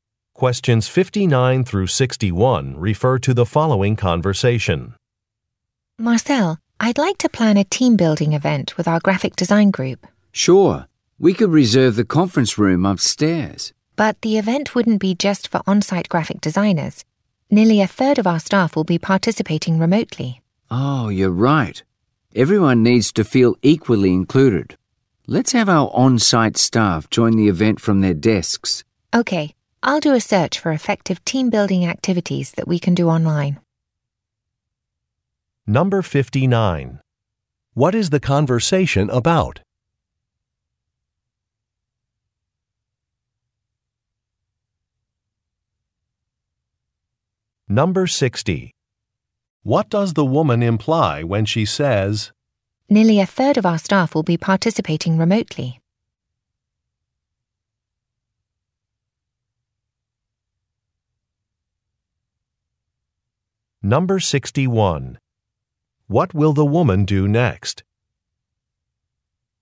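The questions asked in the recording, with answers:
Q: What is the conversation about?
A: Planning a team-building event

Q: "Nearly a third of our staff will be participating remotely"?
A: The conference room is not a suitable choice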